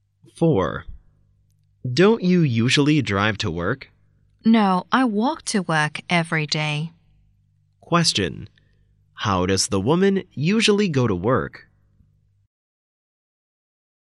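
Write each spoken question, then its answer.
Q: How does the woman usually go to work?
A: She walks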